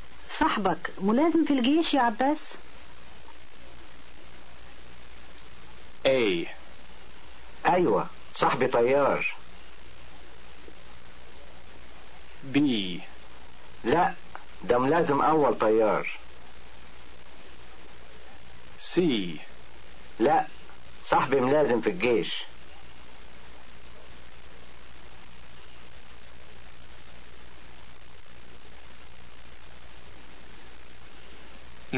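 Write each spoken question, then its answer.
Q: صاحبك ملازم في الجيش يا عباس؟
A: B: لا ده ملازم اول طيار.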